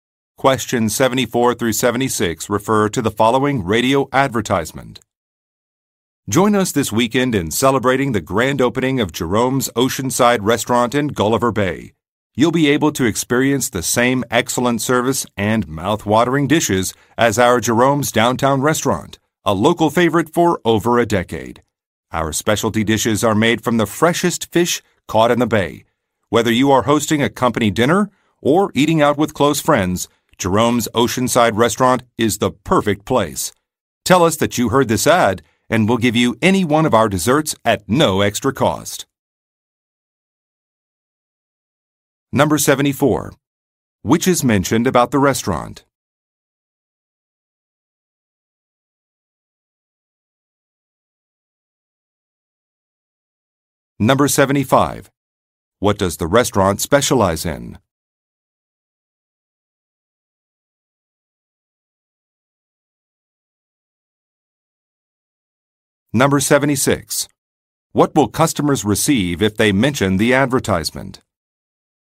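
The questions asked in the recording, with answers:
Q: What does the restaurant specialize in?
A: Fresh fish (seafood) from the bay

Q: What will customers receive if they mention the advertisement?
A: A free dessert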